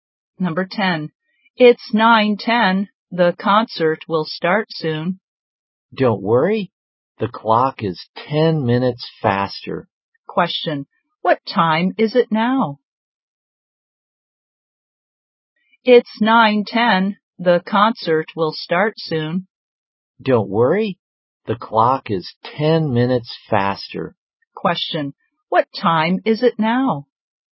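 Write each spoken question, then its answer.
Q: What time is it now?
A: 9:00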